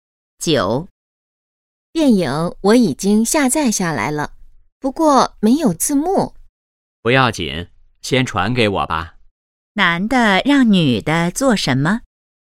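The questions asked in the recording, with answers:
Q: 男的让女的做什么?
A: 先把电影传给他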